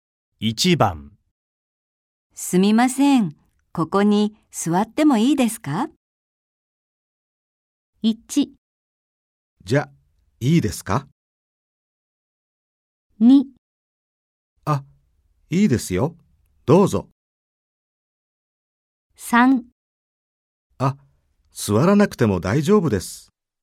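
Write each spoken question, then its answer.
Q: すみません。ここに座ってもいいですか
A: 2: あ、いいですよ。どうぞ。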